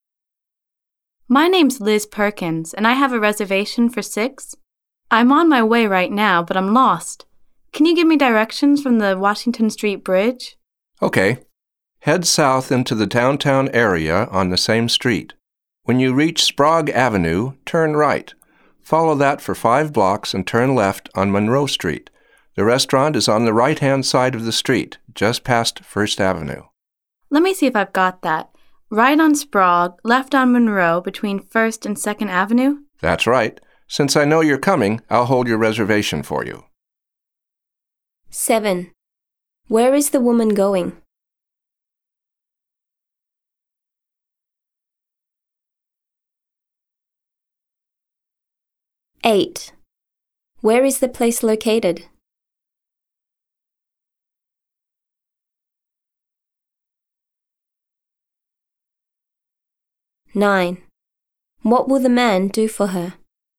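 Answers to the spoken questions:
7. To a restaurant
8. On Monroe Street, just past First Avenue (between First and Second)
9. Hold her reservation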